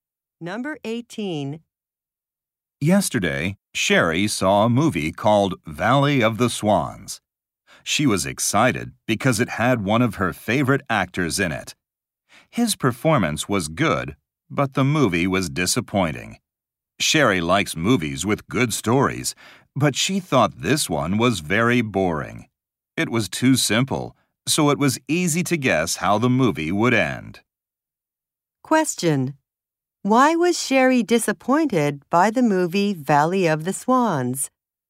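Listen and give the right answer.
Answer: The story was boring and easy to predict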